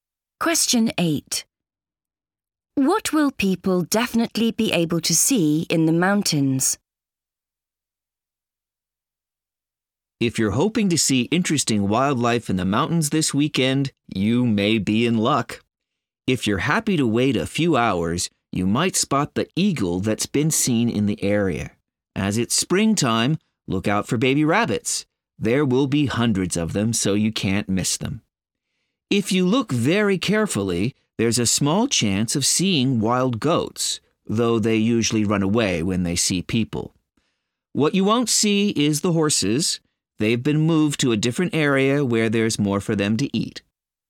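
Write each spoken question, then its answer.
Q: What will people definitely be able to see in the mountains?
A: Baby rabbits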